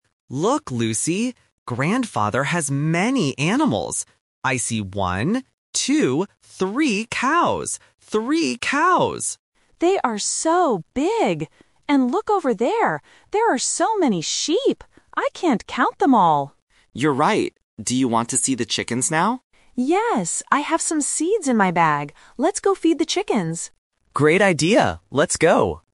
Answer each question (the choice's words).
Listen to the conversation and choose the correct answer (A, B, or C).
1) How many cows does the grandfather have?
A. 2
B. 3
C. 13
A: 3

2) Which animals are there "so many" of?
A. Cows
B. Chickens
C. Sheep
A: Sheep

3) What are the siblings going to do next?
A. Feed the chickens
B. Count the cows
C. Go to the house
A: Feed the chickens

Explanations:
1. Tom counts clearly: "one, two, three cows" and repeats "Three cows!". Option (C) 13 is a sound distractor (bẫy âm thanh giữa -teen và -ty/số đơn vị).
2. Lucy says: "There are so many sheep. I can't count them all!". Cows are mentioned but there are only three (fixed number).
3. Lucy suggests: "Let's go feed the chickens" and Tom agrees. "Count the cows" was already done at the beginning.

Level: A1